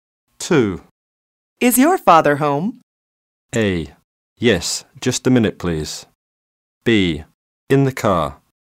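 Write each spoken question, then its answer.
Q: Is your father home?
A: A: Yes, just a minute, please.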